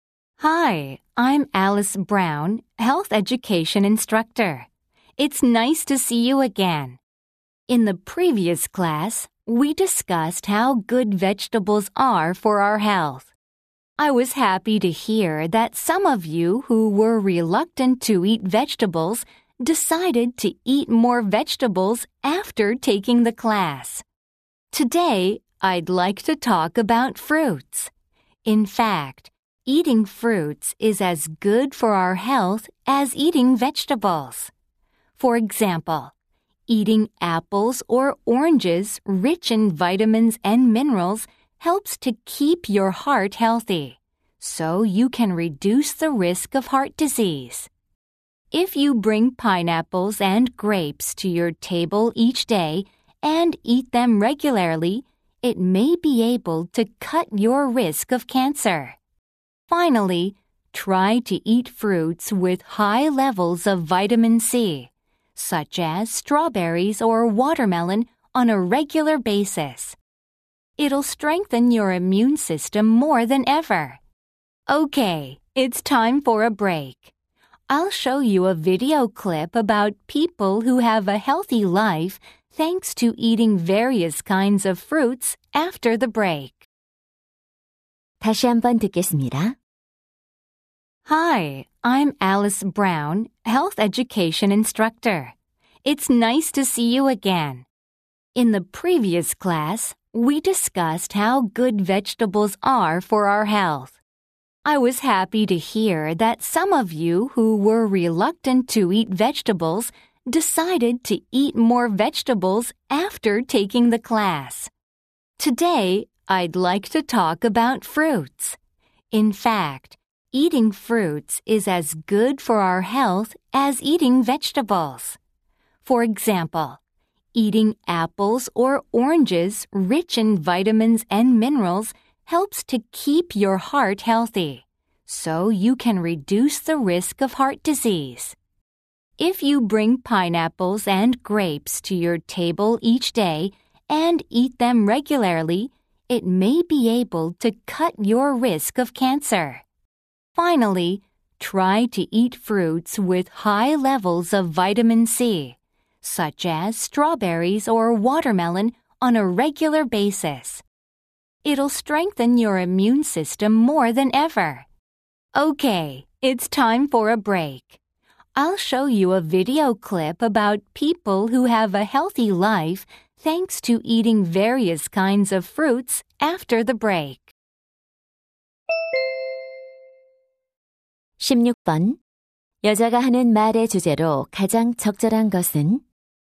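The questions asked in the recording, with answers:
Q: 여자가 하는 말의 주제로 가장 적절한 것은?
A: 과일 섭취가 건강에 주는 이점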